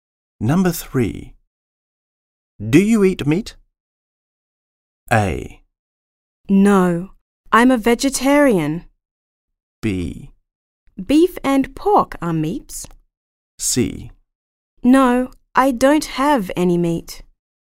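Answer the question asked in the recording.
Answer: A: No, I'm a vegetarian.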